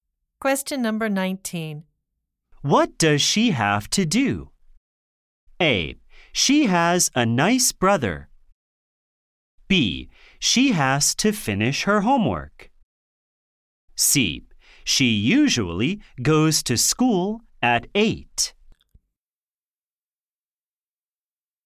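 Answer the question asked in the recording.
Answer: B: She has to finish her homework.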